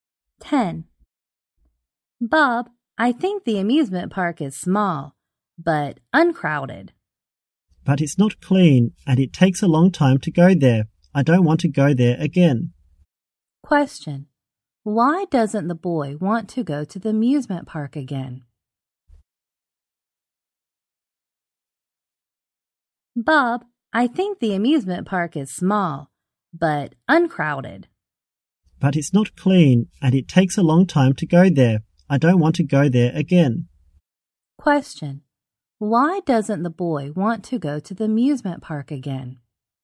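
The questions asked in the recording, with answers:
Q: Why doesn't the boy want to go to the amusement park again?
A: It's not clean and takes a long time to get there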